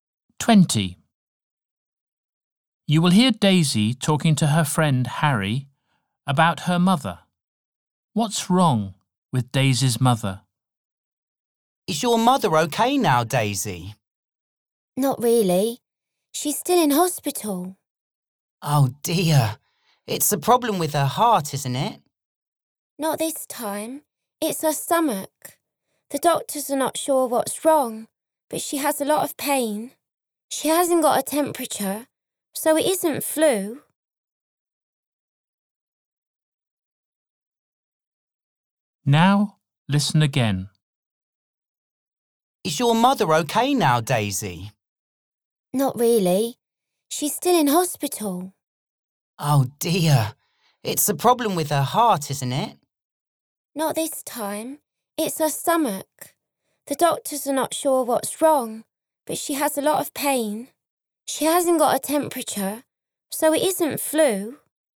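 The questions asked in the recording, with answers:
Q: What's wrong with Daisy's mother?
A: She has a problem with her stomach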